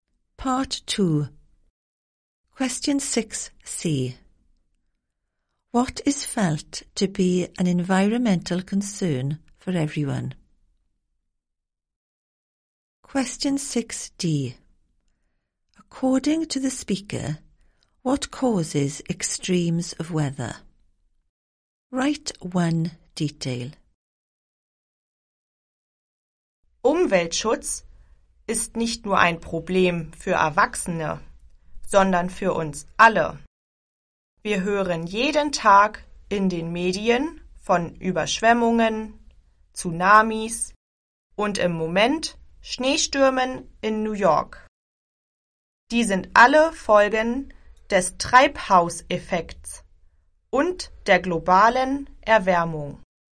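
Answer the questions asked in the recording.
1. Environmental protection
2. Greenhouse effect / global warming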